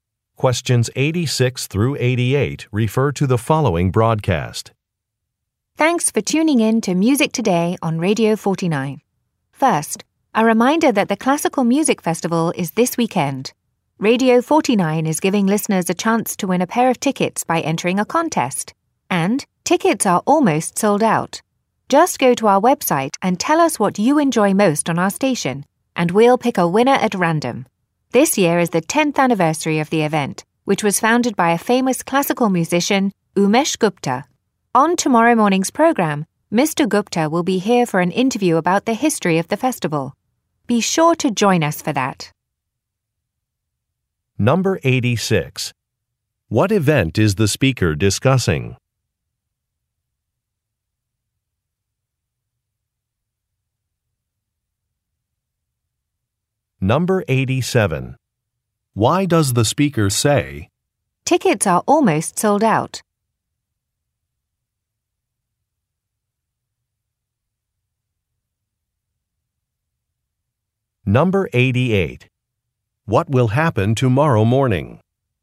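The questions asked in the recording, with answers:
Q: What event is the speaker discussing?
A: A classical music festival

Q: What will happen tomorrow morning?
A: Umesh Gupta will be interviewed about the festival's history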